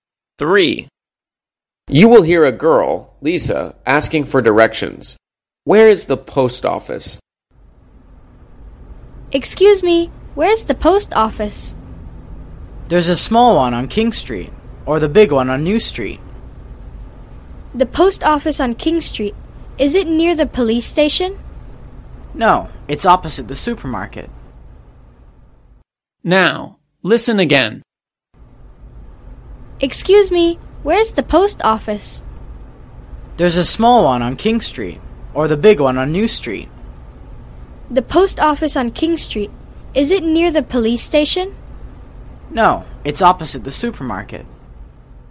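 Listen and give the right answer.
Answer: On King Street, opposite the supermarket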